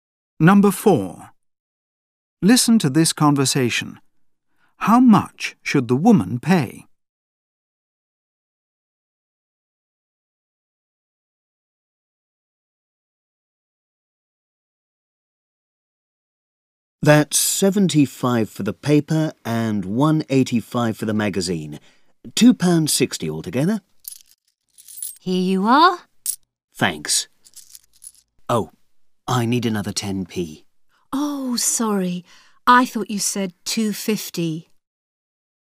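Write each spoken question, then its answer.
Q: How much should the woman pay?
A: £2.60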